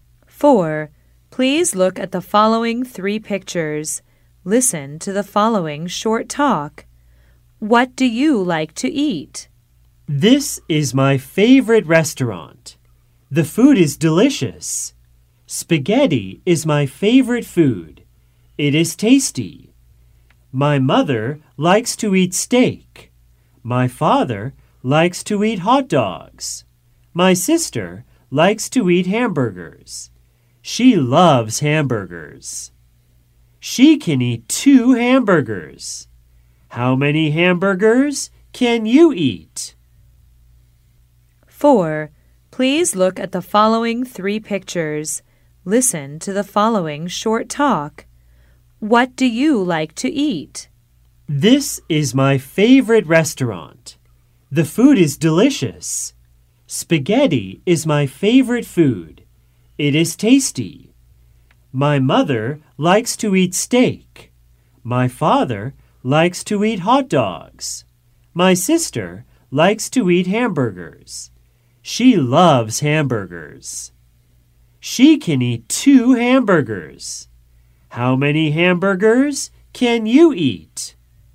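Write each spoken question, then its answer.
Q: What do you like to eat?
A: Spaghetti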